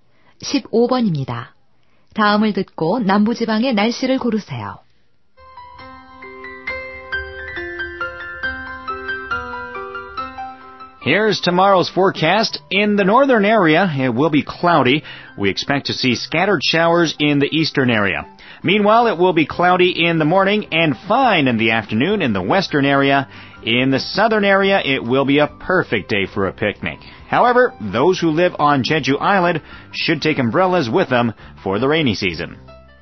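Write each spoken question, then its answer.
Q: 다음을 듣고 남부지방의 날씨를 고르세요.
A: 맑음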